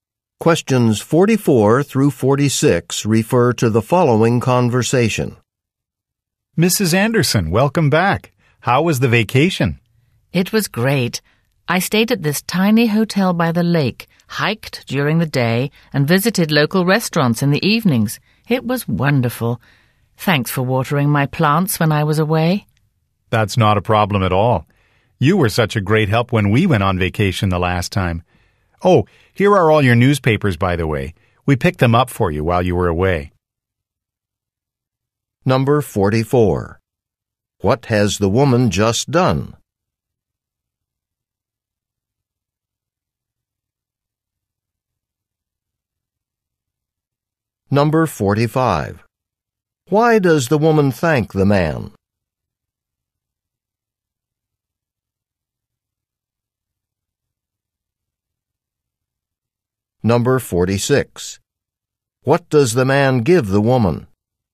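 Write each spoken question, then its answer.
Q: What has the woman just done?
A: Come back from a vacation

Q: Why does the woman thank the man?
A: For watering her plants

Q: What does the man give the woman?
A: Her newspapers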